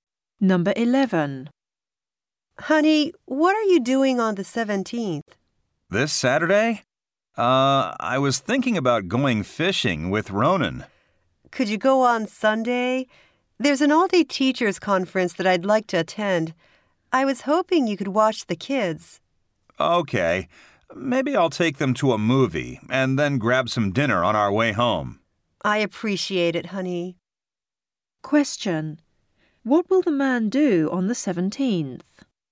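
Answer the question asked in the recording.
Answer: Look after the kids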